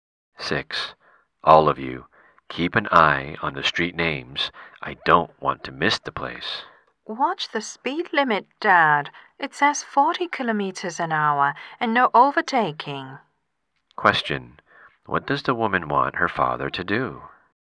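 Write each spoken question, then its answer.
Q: What does the woman want her father to do?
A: Watch the speed limit and drive at no more than 40 km an hour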